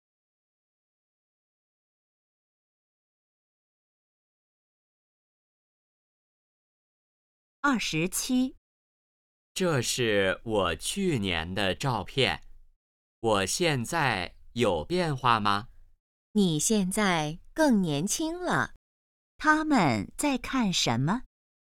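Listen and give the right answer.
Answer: 照片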